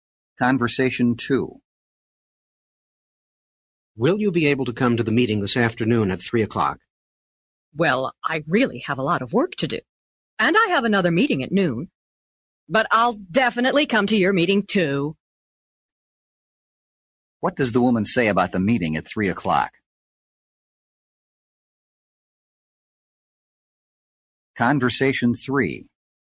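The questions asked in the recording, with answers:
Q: What does the woman say about the meeting at 3 o'clock?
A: She'll definitely come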